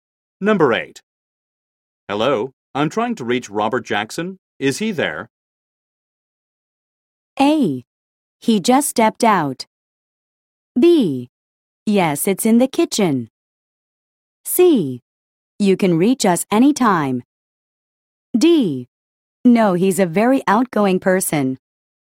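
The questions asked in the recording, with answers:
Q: Hello, I'm trying to reach Robert Jackson. Is he there?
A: A: He just stepped out.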